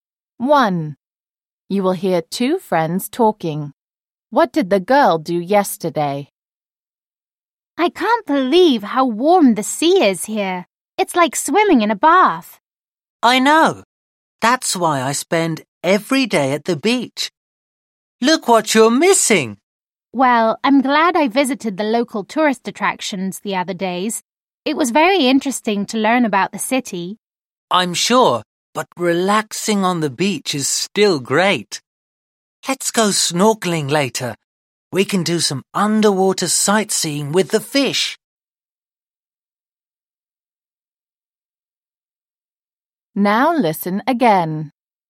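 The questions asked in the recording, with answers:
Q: What did the girl do yesterday?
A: She visited the local tourist attractions in the city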